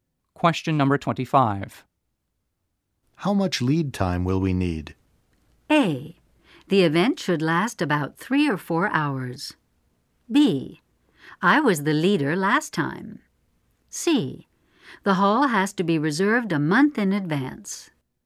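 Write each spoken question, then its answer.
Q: How much lead time will we need?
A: C: The hall has to be reserved a month in advance.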